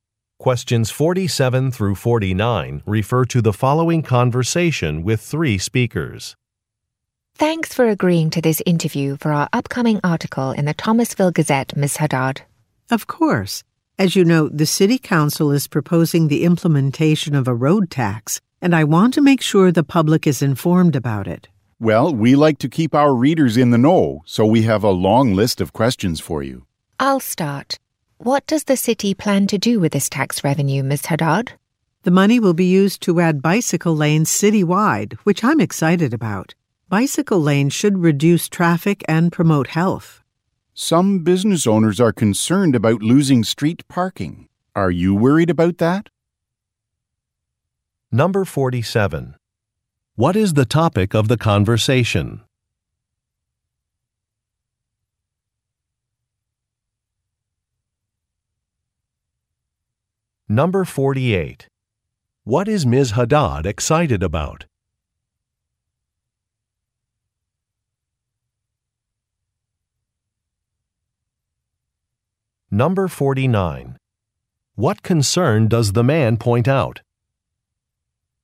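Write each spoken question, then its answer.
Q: What is the topic of the conversation?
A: A proposed road tax

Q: What is Ms. Haddad excited about?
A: Adding bicycle lanes citywide

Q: What concern does the man point out?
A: Loss of street parking for businesses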